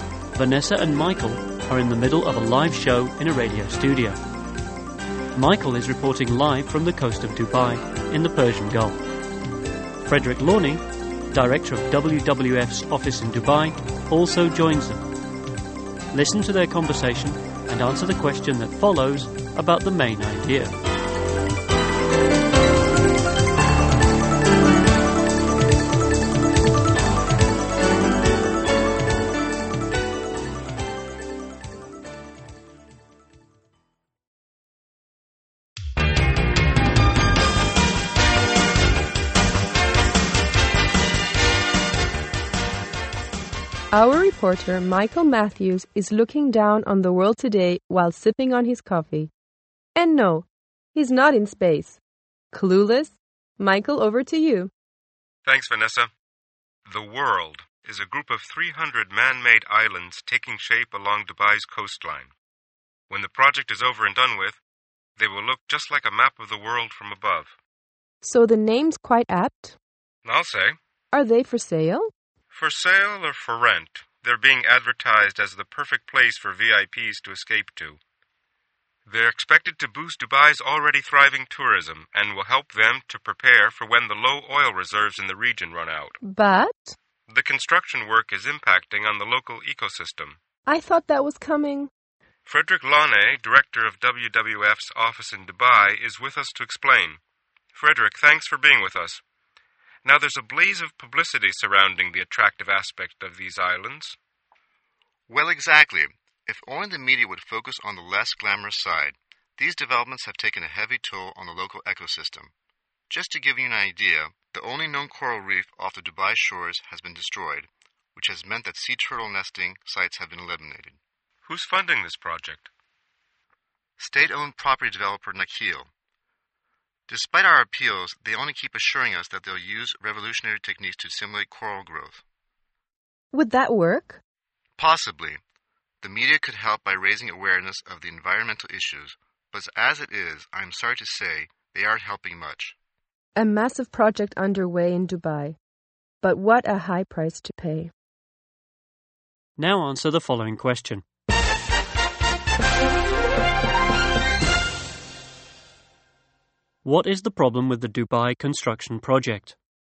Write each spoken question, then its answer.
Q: What is the problem with the Dubai construction project?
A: It's damaging the local ecosystem.